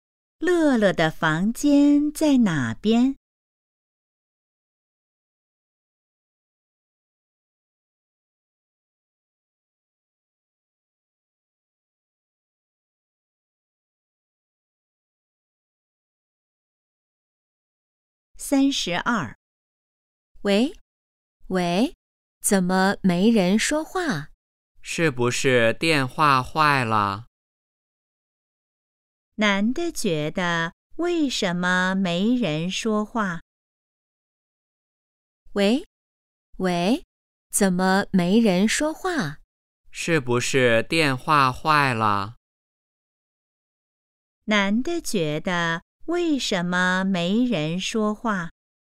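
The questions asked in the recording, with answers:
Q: 男的觉得为什么没人说话?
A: 电话坏了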